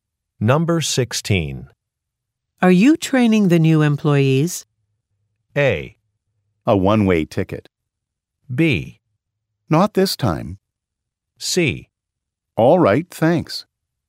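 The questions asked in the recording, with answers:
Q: Are you training the new employees?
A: B: Not this time.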